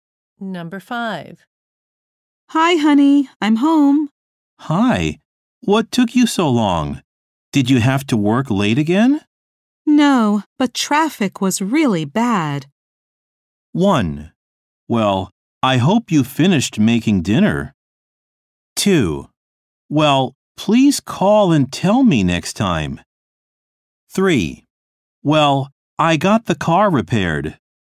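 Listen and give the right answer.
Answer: 2: Well, please call and tell me next time.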